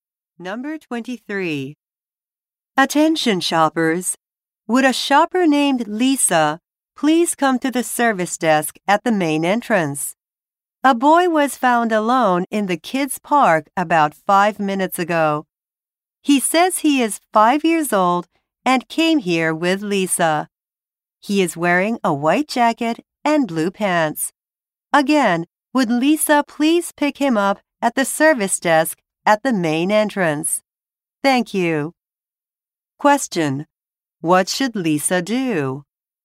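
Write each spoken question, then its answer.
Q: What should Lisa do?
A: Go to the service desk at the main entrance to pick up the boy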